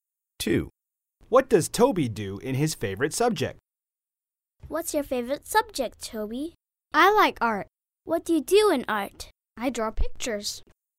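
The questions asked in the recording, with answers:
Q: What does Toby do in his favorite subject?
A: He draws pictures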